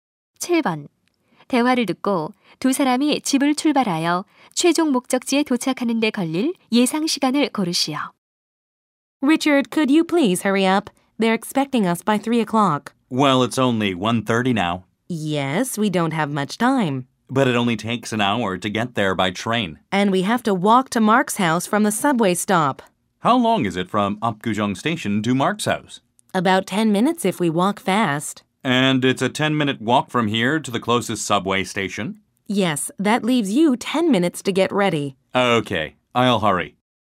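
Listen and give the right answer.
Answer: 1시간 20분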